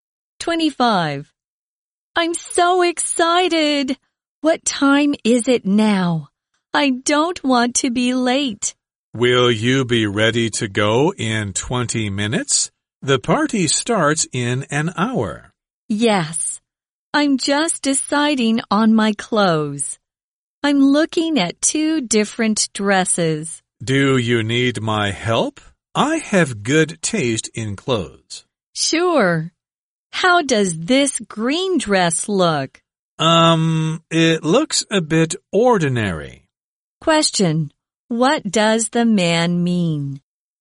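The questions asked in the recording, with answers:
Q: What does the man mean?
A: The green dress looks a bit ordinary.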